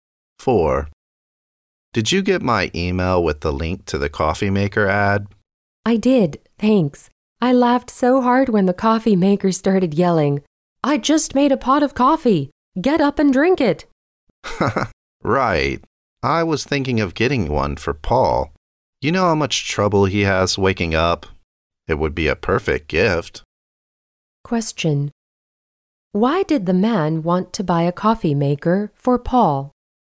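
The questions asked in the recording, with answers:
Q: Why did the man want to buy a coffee maker for Paul?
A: Because Paul has trouble waking up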